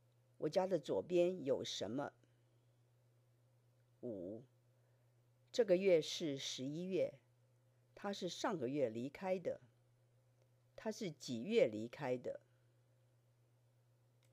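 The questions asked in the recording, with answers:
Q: 他是几月离开的?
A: 十月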